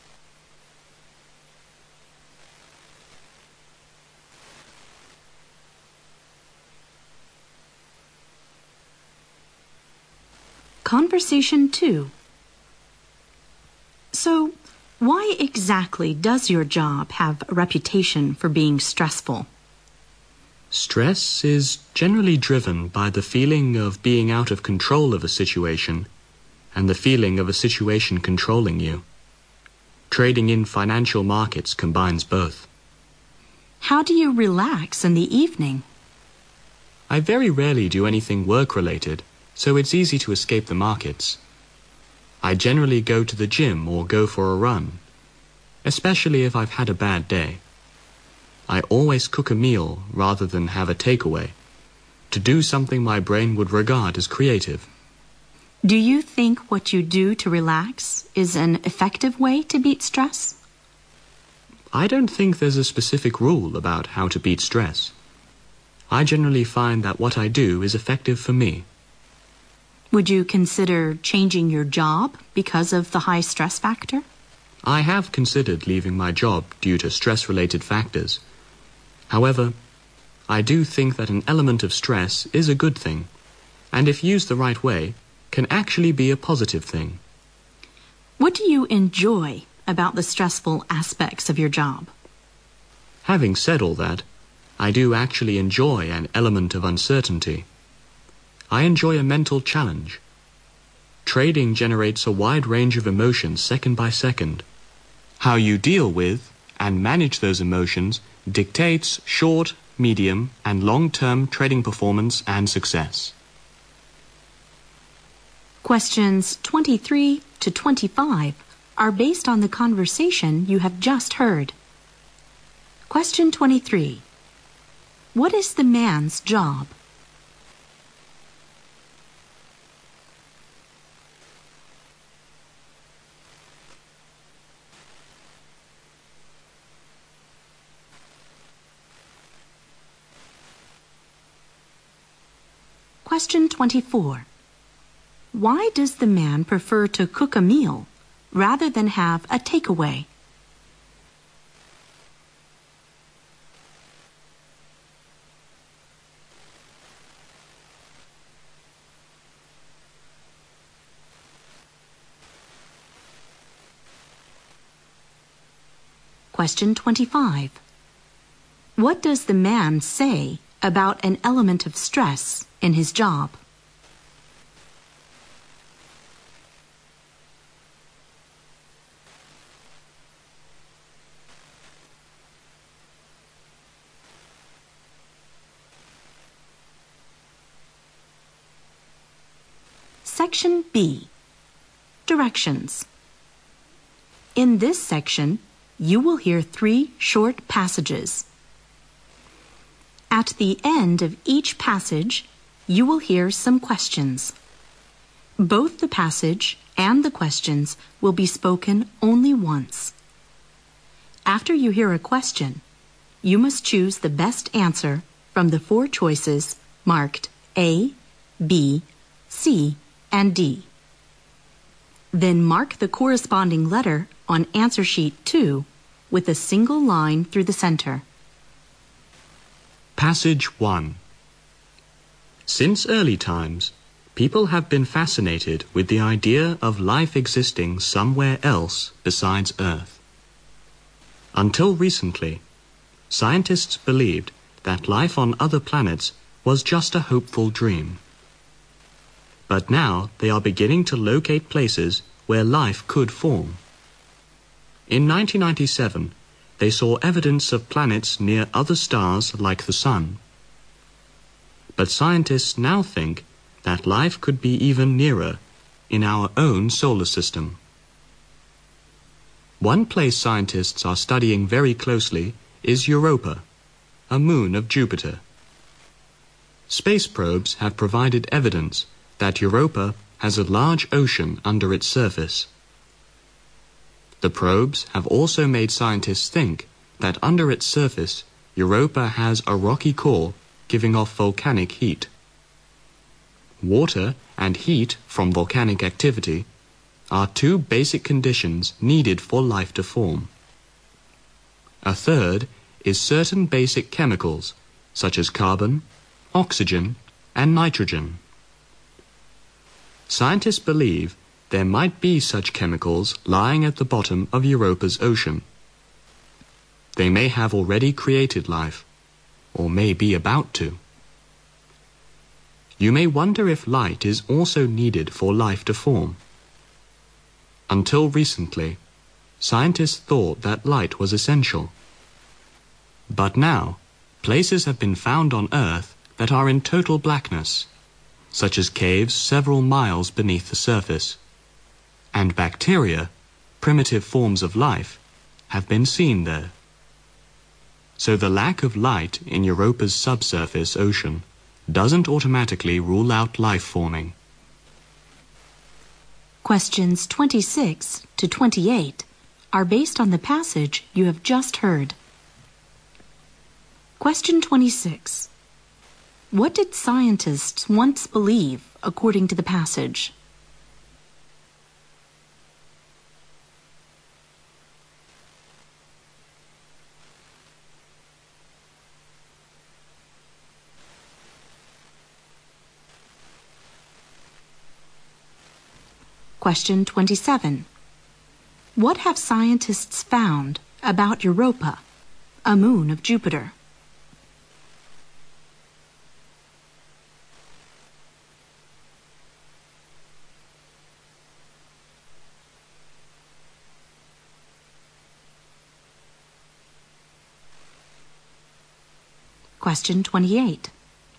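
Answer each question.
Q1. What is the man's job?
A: A trader in financial markets.

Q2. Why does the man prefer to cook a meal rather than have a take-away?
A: To do something his brain regards as creative.

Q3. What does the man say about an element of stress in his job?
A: It is a good thing and can be positive if used the right way.

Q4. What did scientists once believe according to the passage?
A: That life on other planets was just a hopeful dream.

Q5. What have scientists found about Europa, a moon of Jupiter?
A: It has a large ocean under its surface.

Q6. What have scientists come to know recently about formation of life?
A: Light is not essential for life to form.

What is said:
Q22: What does the man want to know at the end of the conversation?
Long Conversation 2:
W: So why exactly does your job have a reputation for being stressful?
M: Stress is generally driven by the feeling of being out of control of a situation, and a feeling of a situation controlling you. 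Trading in financial markets combines both.
W: How do you relax in the evening?
M: I very rarely do anything work-related. So it's easy to escape the markets. I generally go to the gym or go for a run, especially if I've had a bad day. I always cook a meal, rather than have a take-away., to do something my brain would regard as creative.
W: Do you think what you do to relax is an effective way to beat stress?
M: I don't think there's a specific rule about how to beat stress. I generally find that what I do is effective for me.
W: Would you consider changing your job because of the high-stress factor?
W: I have considered leaving my job due to stress-related factors. However, I do think that an element of stress is a good thing, and if use the right way, can actually be a positive thing.
W: What do you enjoy about the stressful aspects of your job?
M: Having said all that, I do actually enjoy and element of uncertainty. 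I enjoy a mental challeng. Trading generates a wide range of emotions second by second. How you deal with and manage those emotions dictates short, medium, and long term trading perfomance and success.
Questions 23 to 25 are based on the conversation you've just herad.
Passage 1
Since early times, people have been fascinated with the idea of life existing somewhere else besides earth. Until recently, scientists believe that life on other planets was just a hopeful dream. But now they are beginning to locate places where life could form. In 1997, they saw evidence of planets near other stars like the sun. But scientists now think that life could be even nearer in our own solar system. One place scientists are studying very closely is Europa, a moon of Jupiter. Space probes have provided evidence that Europa has a large ocean under its surface. The probes have also made scientists think that under its surface Europa has a rocky core giving off volcanic heat. 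Water and heat from volcanic activity are two basic conditions needed for life to form. A third is certain basic chemicals such as carbon, oxygen and nitrogen. Scientists believe there might be such chemicals lying at the bottom of Europa's ocean. They may have already created life or may be about to. You may wonder if light is also needed for life to form. Until recently, scientists thought that light was essential. But now, places have been found on earth that are in total blackness such as caves several miles beneath the surface. And bacteria, primitive forms of life, have been seen there. So the lack of light in Europa's sub-surface ocean doesn't automatically rule out life forming.
Questions26 to 28

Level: 大学英语四级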